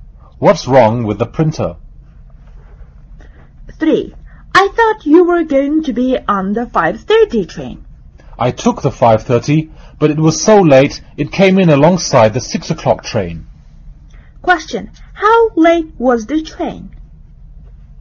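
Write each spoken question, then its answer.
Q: How late was the train?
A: 30 minutes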